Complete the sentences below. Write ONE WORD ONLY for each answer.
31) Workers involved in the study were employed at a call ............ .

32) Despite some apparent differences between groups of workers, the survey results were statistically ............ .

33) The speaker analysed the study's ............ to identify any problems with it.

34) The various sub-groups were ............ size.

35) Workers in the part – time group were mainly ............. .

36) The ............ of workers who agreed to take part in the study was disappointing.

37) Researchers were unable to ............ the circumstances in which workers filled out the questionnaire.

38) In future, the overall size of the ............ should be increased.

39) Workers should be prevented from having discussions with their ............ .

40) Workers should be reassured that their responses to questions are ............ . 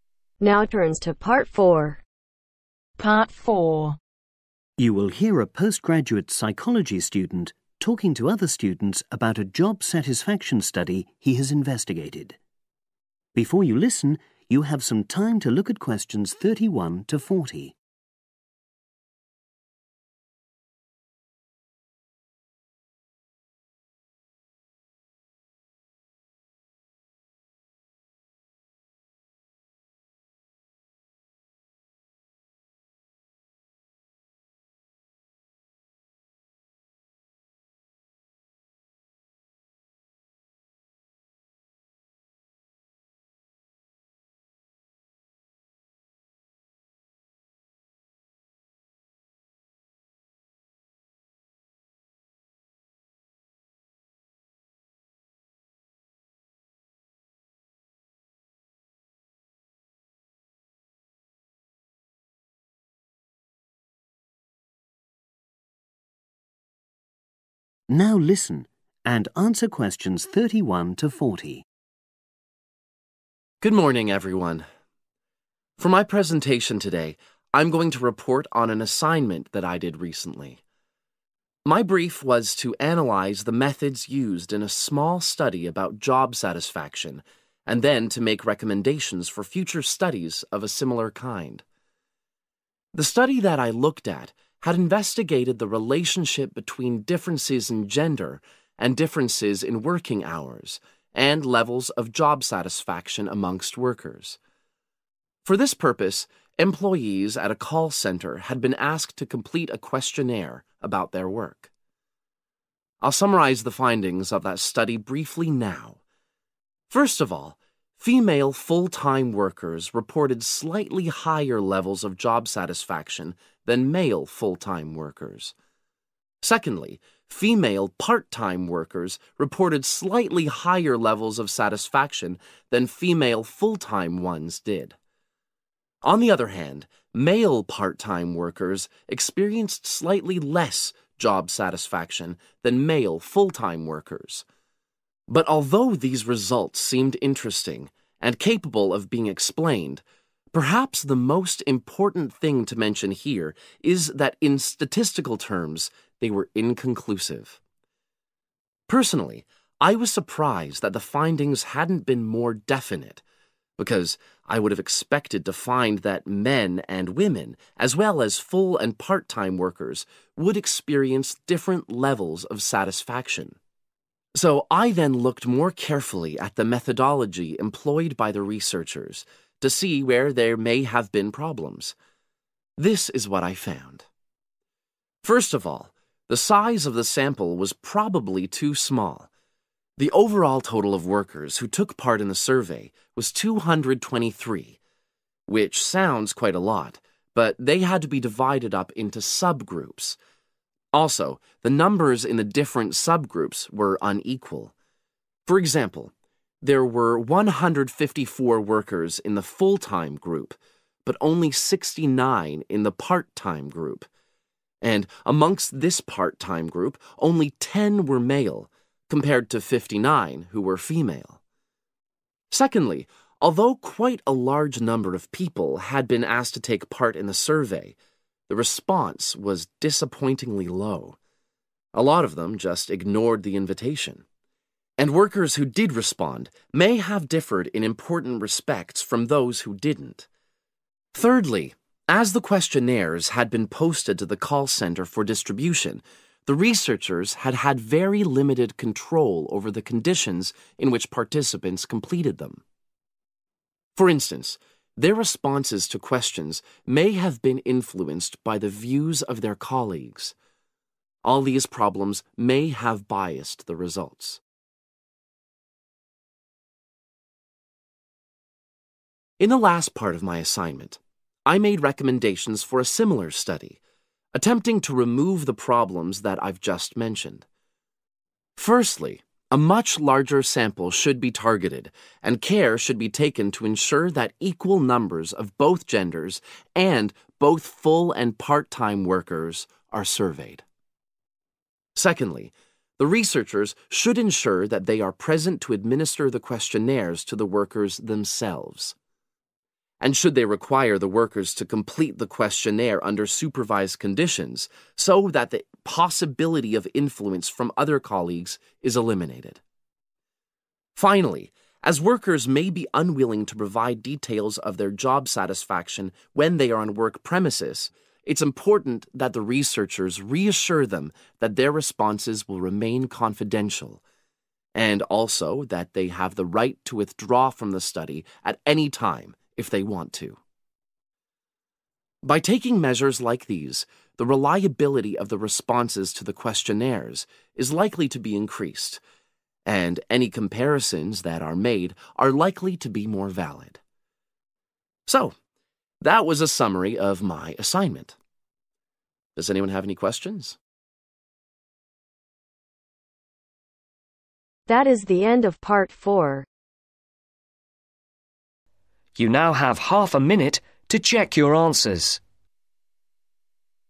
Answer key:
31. center
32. inconclusive
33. methodology/methods
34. unequal
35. female/women
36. response
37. control
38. sample/group
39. colleagues
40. confidential